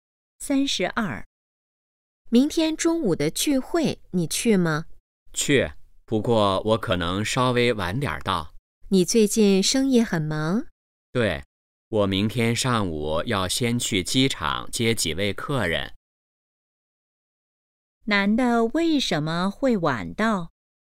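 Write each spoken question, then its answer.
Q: 男的为什么会晚到?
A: 要先去机场接客人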